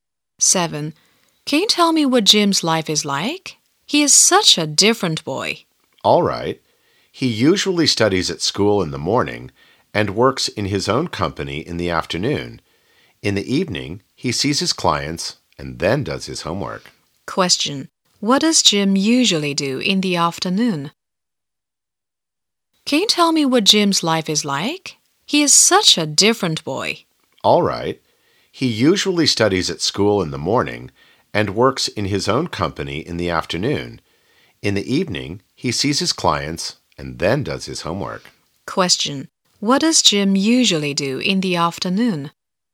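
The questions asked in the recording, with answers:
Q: What does Jim usually do in the afternoon?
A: Works in his own company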